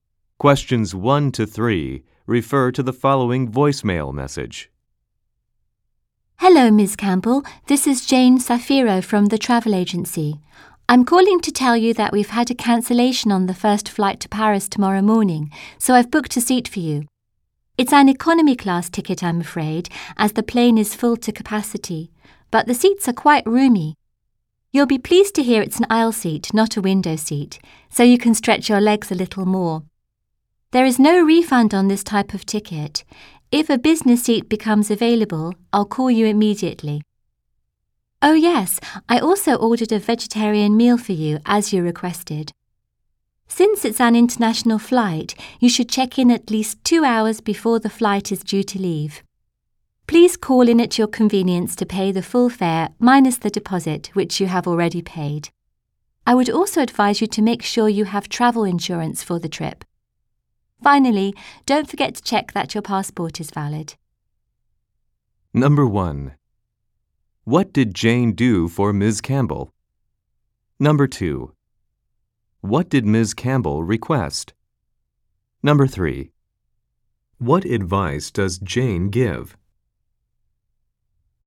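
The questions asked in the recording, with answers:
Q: What did Jane do for Ms. Campbell?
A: Booked her a seat on the first flight to Paris tomorrow morning

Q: What did Ms. Campbell request?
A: A vegetarian meal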